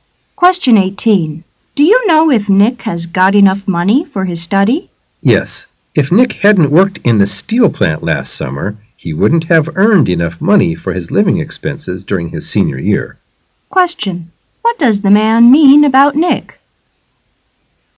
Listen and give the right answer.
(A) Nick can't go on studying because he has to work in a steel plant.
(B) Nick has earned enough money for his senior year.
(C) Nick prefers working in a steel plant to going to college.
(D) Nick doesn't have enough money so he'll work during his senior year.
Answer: (B) Nick has earned enough money for his senior year.